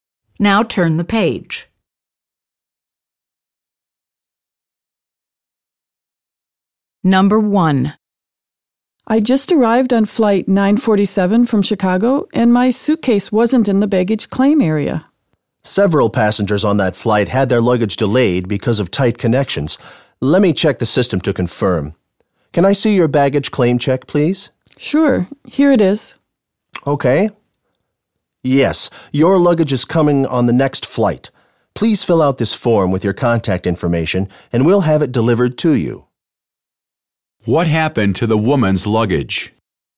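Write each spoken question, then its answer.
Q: What happened to the woman's luggage?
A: It was delayed and is coming on the next flight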